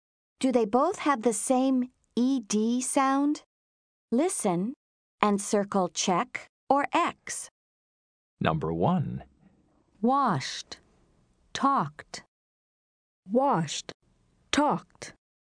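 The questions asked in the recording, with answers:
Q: Do they both have the same ED sound?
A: Yes (check): both /t/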